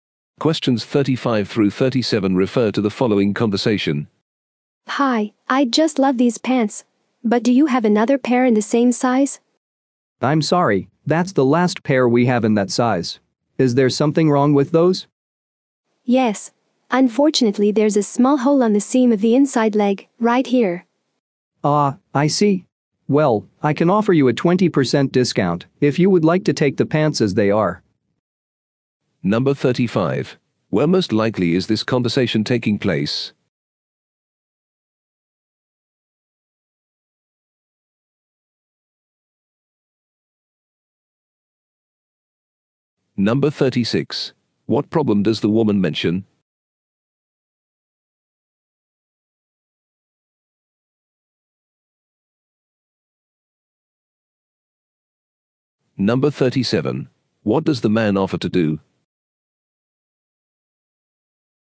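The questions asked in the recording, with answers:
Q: Where most likely is this conversation taking place?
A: In a clothing store

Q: What problem does the woman mention?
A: There is a small hole in the pants' seam

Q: What does the man offer to do?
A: Give a 20% discount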